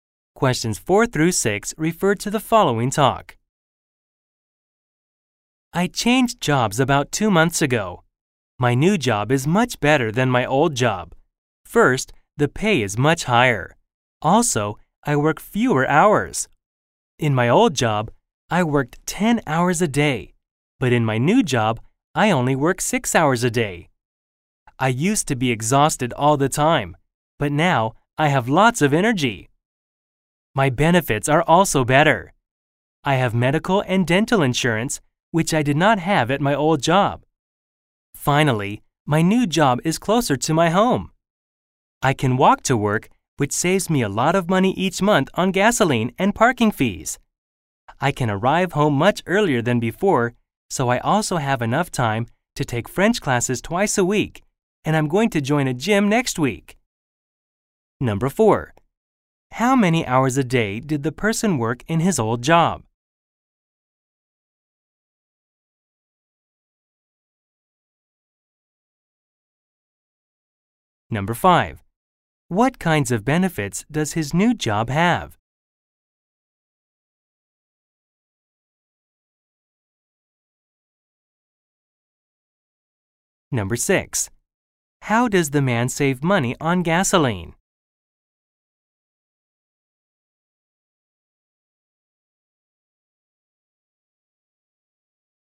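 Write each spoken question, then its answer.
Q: How many hours a day did the person work in his old job?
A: 10 hours

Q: What kinds of benefits does his new job have?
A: Medical and dental insurance

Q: How does the man save money on gasoline?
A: He walks to work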